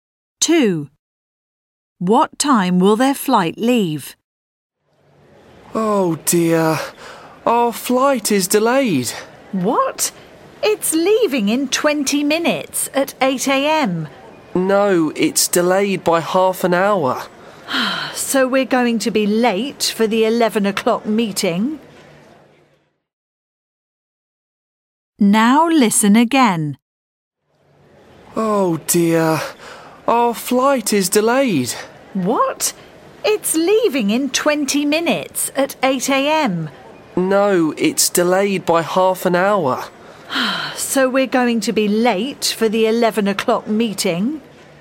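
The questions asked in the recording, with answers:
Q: What time will their flight leave?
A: 8:30 a.m.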